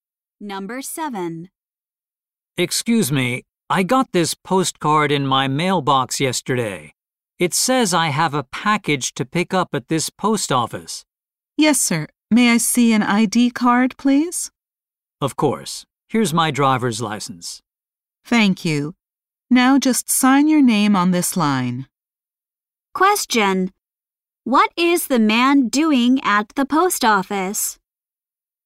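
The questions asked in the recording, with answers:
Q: What is the man doing at the post office?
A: Picking up a package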